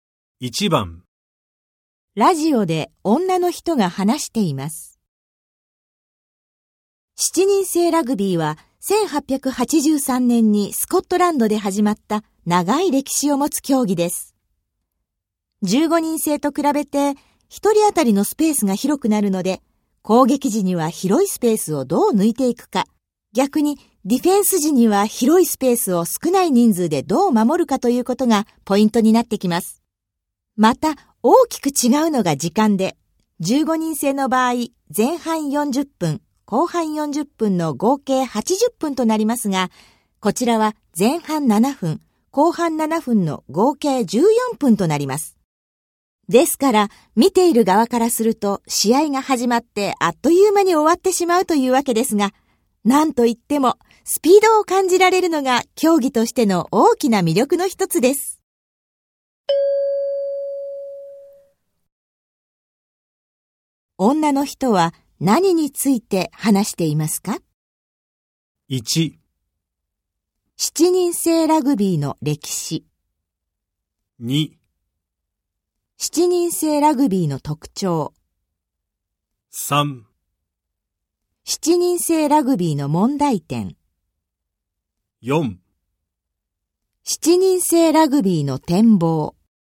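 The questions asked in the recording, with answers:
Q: 女の人は何について話していますか?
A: 2: 七人制ラグビーの特徴。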